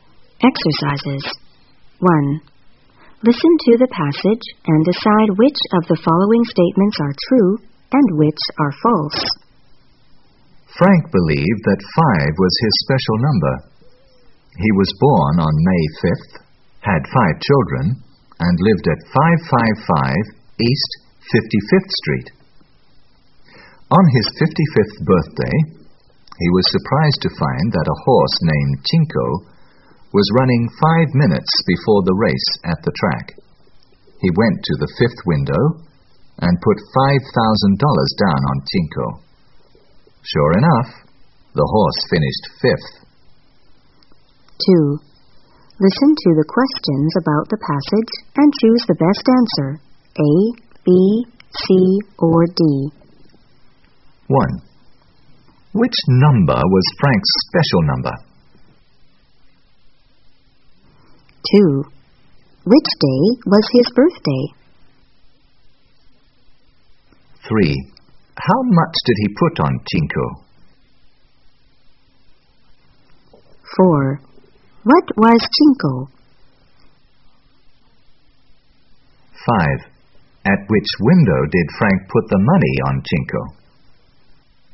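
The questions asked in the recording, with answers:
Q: Which day was his birthday?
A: May 5th

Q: How much did he put on Tinko?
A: $5,000

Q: What was Tinko?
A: A horse

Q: At which window did Frank put the money on Tinko?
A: The 5th window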